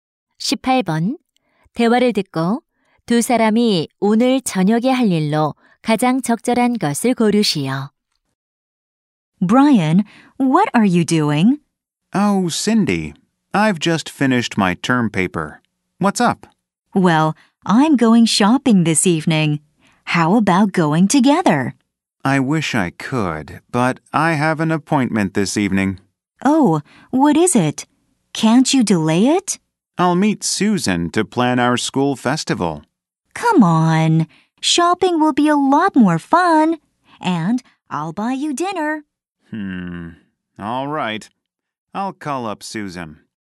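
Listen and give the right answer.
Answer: 함께 쇼핑하러 가기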